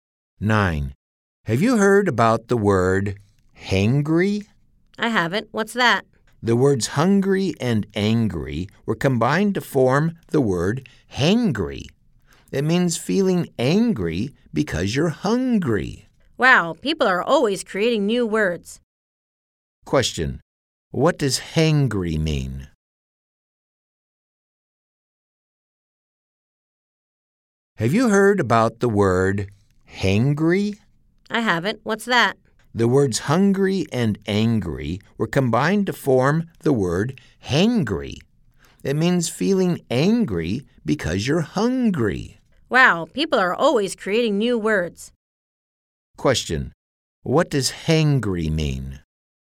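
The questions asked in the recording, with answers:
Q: Question. What does hangry mean?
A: Feeling angry because you're hungry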